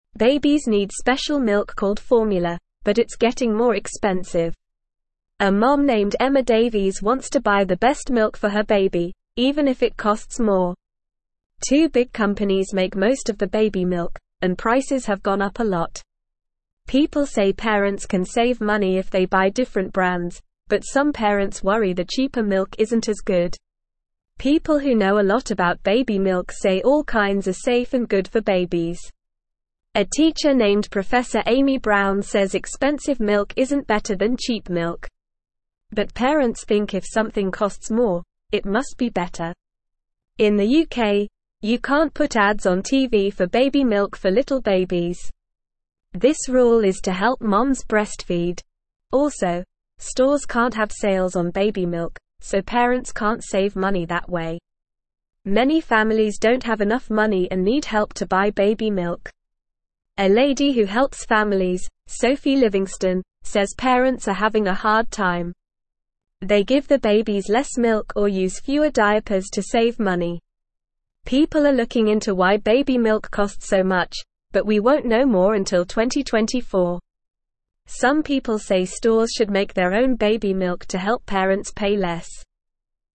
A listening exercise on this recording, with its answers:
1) Babies need special milk (1)______ formula, but it's getting more expensive.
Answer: called

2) A mom named Emma (2)______ wants to buy the best milk for her baby, even if it costs more.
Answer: Davies

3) People say parents can save (3)______ if they buy different brands, but some parents worry the (4)______ milk isn't as good.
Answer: money

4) People say parents can save (3)______ if they buy different brands, but some parents worry the (4)______ milk isn't as good.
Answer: cheaper

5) (5)______ who know a lot about baby milk say all kinds are safe and good for babies.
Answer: People

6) A teacher (6)______ Professor Amy Brown says expensive milk isn't better than cheap milk.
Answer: named

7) In the UK, you can't put ads on TV for baby milk for little (7)______.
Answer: babies

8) Also, stores can't have sales on baby milk, so (8)______ can't save money that way.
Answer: parents

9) Many (9)______ don't have enough money and need help to buy baby milk.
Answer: families

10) They give their babies less (10)______ or use fewer diapers to save money.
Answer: milk

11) People are looking into why (11)______ milk costs so much, but we won't know more until 2024.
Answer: baby

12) Some people say (12)______ should make their own baby milk to help parents pay less.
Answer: stores

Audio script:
Babies need special milk called formula, but it's getting more expensive. A mom named Emma Davies wants to buy the best milk for her baby, even if it costs more. Two big companies make most of the baby milk, and prices have gone up a lot. People say parents can save money if they buy different brands, but some parents worry the cheaper milk isn't as good.
People who know a lot about baby milk say all kinds are safe and good for babies. A teacher named Professor Amy Brown says expensive milk isn't better than cheap milk. But parents think if something costs more, it must be better. In the UK, you can't put ads on TV for baby milk for little babies. This rule is to help moms breastfeed. Also, stores can't have sales on baby milk, so parents can't save money that way.
Many families don't have enough money and need help to buy baby milk. A lady who helps families, Sophie Livingstone, says parents are having a hard time. They give their babies less milk or use fewer diapers to save money. People are looking into why baby milk costs so much, but we won't know more until 2024. Some people say stores should make their own baby milk to help parents pay less.

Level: Level 2